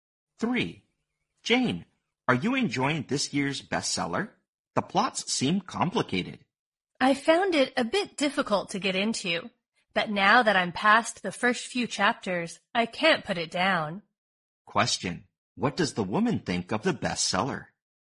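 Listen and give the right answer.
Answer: It was hard to get into at first, but now she finds it gripping.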